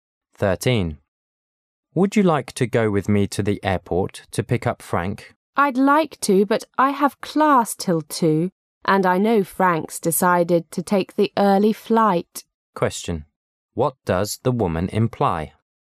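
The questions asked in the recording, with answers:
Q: What does the woman imply?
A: She can't go to the airport to pick up Frank

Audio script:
[解析] M: Would you like to go with me to the airport to pick up Frank? W: I'd like to, but I have class till 2.00. And I know Frank's decided to take the early flight. Q: What does the woman imply?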